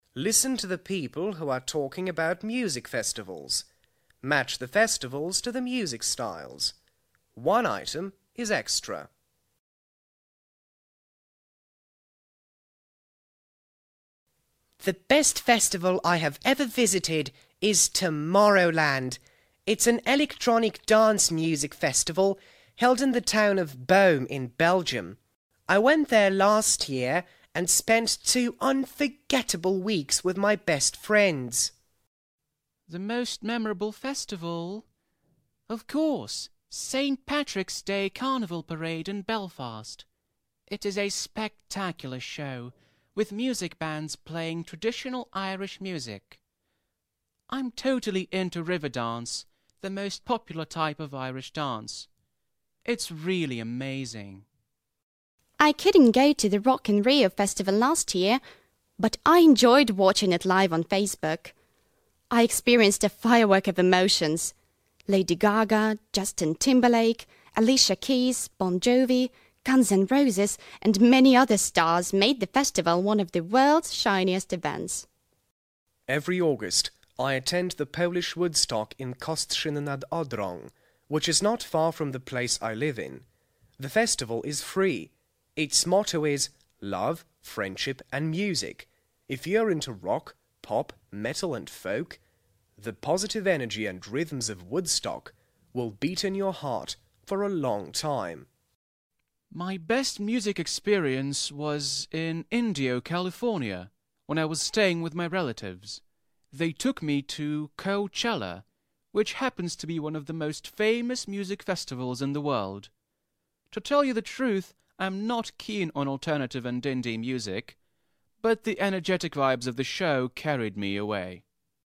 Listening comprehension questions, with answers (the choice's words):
Listen to the people who are talking about music festivals. Match the festivals to the music styles. One item is extra.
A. electronic dance music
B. jazz and blues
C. traditional Irish music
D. rock music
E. rock, pop, metal and folk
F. alternative and indie music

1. Tomorrowland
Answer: electronic dance music

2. St Patrick's Day parade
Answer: traditional Irish music

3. The festival in Rio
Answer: rock music

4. Woodstock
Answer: rock, pop, metal and folk

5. Coachella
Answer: alternative and indie music